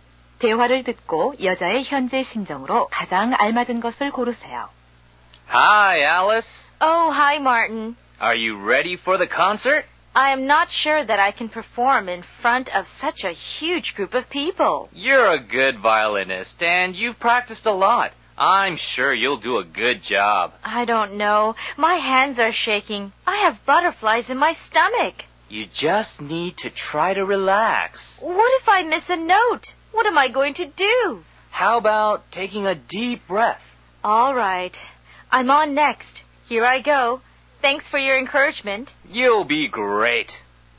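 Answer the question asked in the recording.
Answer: 긴장되고 불안함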